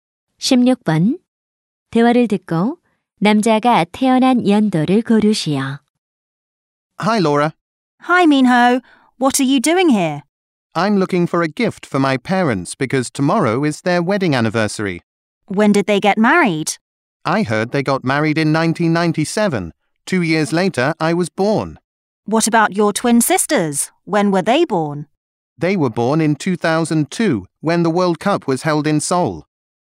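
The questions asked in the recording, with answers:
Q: 대화를 듣고 남자가 태어난 연도를 고르시오.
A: 1999년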